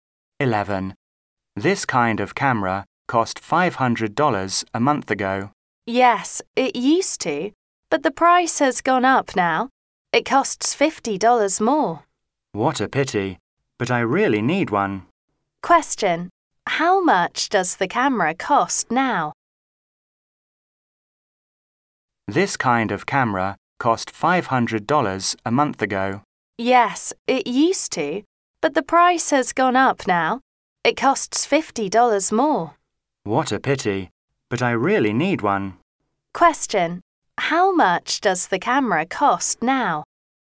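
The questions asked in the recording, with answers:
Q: Question: how much does the camera cost now?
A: $550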